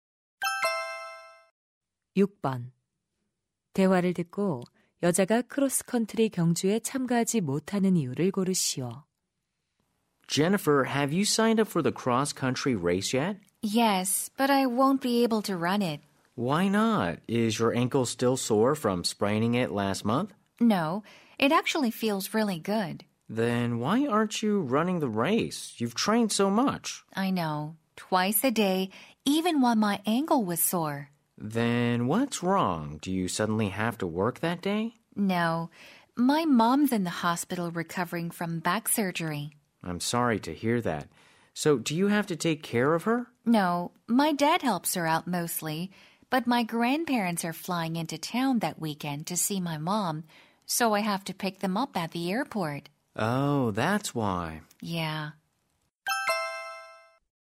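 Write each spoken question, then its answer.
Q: 대화를 듣고 여자가 크로스컨트리 경주에 참가하지 못하는 이유를 고르시오.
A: 공항에 조부모님을 마중 나가야 해서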